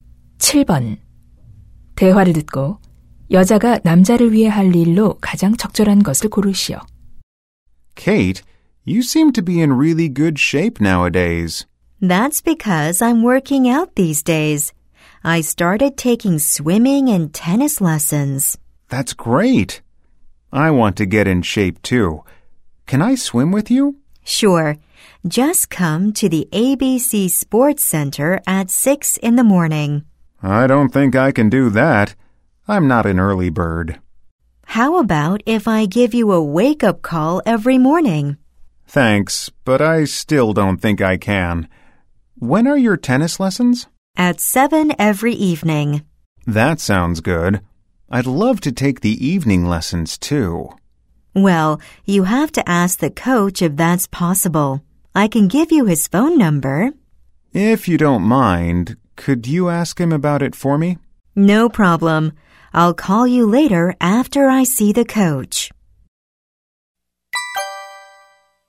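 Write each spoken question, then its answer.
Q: 대화를 듣고 여자가 남자를 위해 할 일로 가장 적절한 것을 고르시오.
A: 테니스 코치에게 저녁 수업이 가능한지 물어보기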